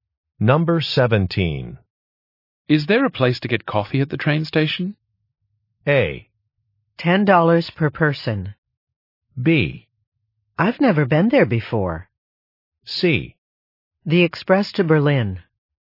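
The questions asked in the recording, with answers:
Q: Is there a place to get coffee at the train station?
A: B: I've never been there before.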